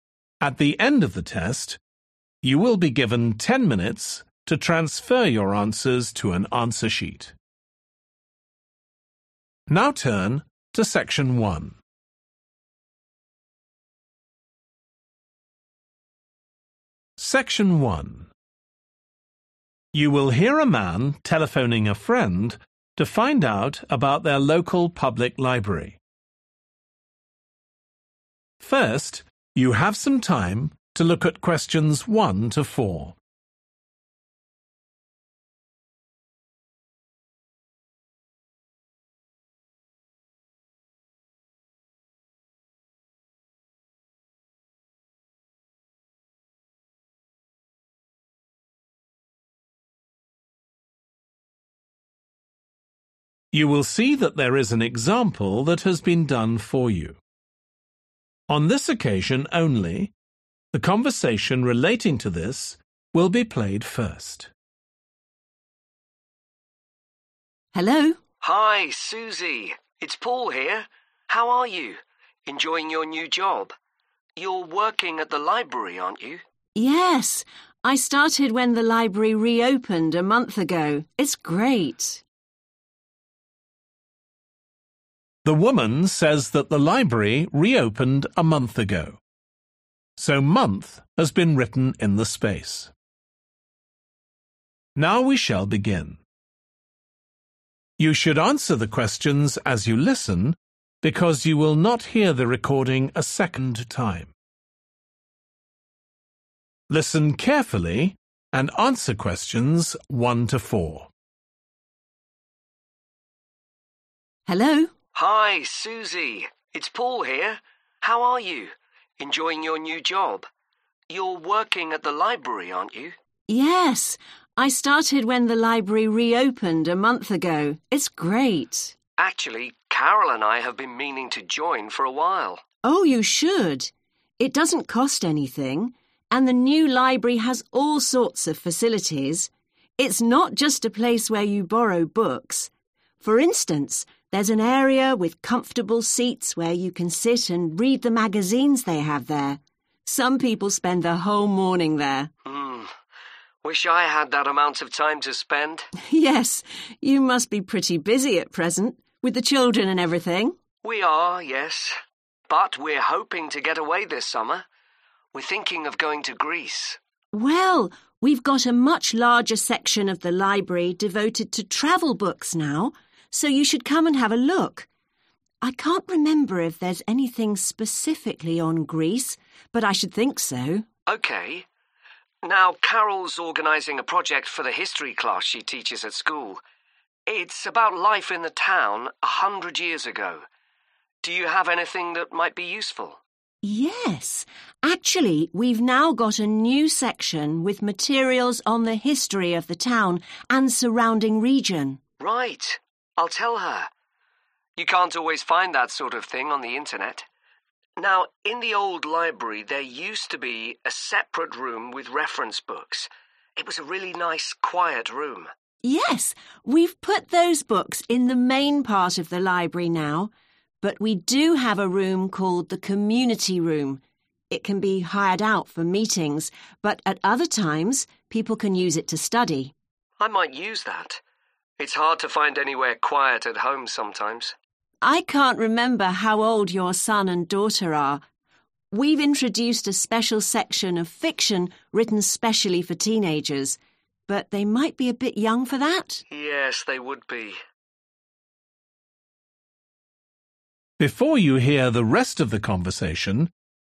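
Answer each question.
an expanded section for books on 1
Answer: travel

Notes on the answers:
Well, we've got a much larger section (=extended section) of the library devoted to travel books now(Chà, một phần lớn của thư viện chúng tôi giờ đã dành cho sách du lịch)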